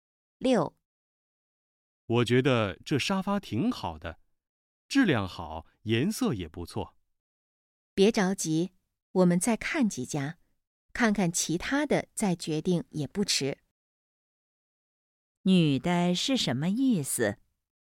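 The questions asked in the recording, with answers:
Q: 女的是什么意思?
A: 再看看其他的再决定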